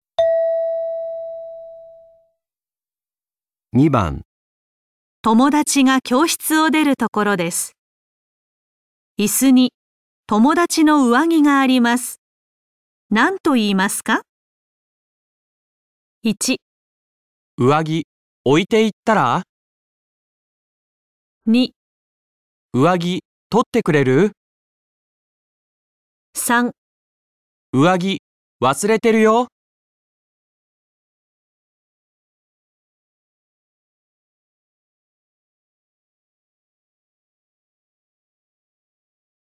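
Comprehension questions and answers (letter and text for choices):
問題4 では、絵を見ながら質問を聞いてください。やじるし(→)の人は何とか言いますか。1から3の中から、最もよいものを一つ選んでください。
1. 友達が教室を出るところです。椅子に友達の上着があります。何と言いますか。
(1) 上着、置いていったら?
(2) 上着、取ってくれる?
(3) 上着、忘れてるよ。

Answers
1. (3) 上着、忘れてるよ。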